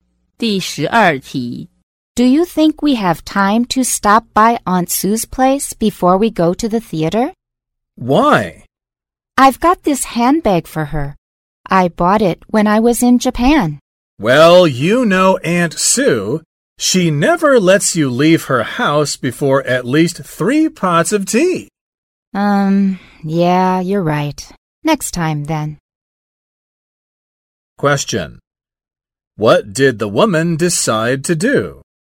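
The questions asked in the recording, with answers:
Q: What did the woman decide to do?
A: Visit Aunt Sue another time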